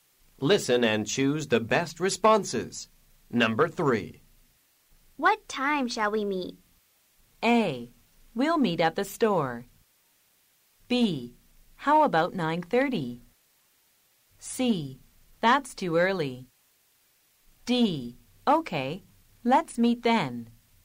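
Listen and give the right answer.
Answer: B: How about 9:30?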